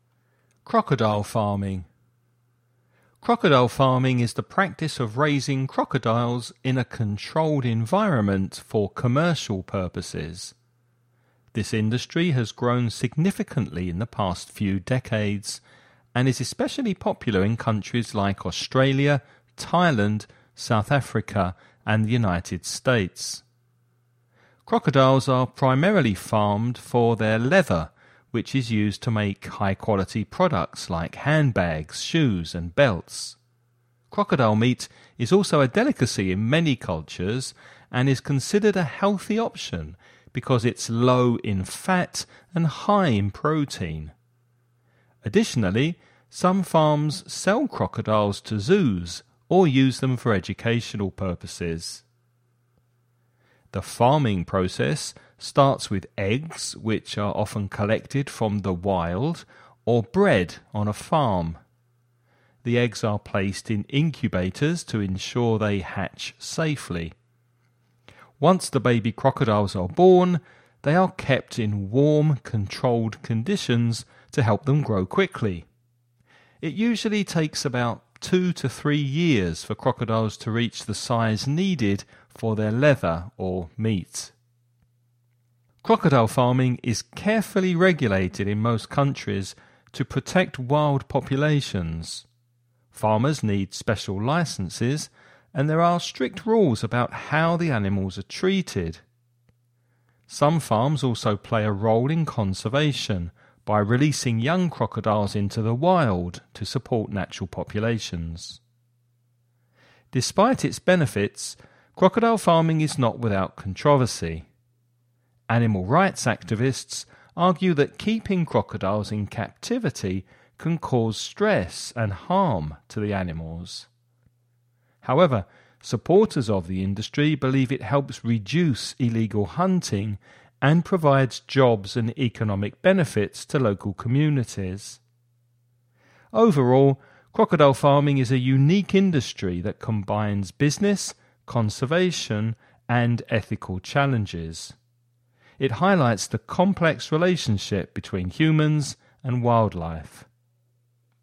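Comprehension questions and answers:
Now listen and answer the questions.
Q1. What is the main purpose of crocodile farming?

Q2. Why is crocodile meat considered a healthy option?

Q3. How are baby crocodiles kept after they are born?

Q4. What role do some farms play in crocodile conservation?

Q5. What is one argument against crocodile farming?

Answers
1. To produce leather for high-quality products like handbags, shoes and belts (and also meat).
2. Because it is low in fat and high in protein.
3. In warm, controlled conditions to help them grow quickly.
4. They release young crocodiles into the wild to support natural populations.
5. Keeping crocodiles in captivity can cause stress and harm to the animals.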